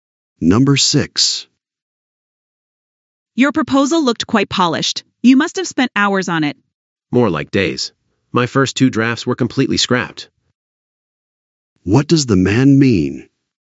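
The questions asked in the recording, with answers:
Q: What does the man mean?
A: It took days and several drafts to make it.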